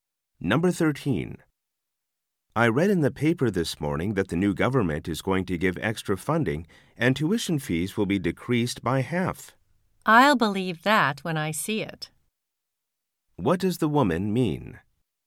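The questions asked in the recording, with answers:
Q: What does the woman mean?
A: She doubts it will happen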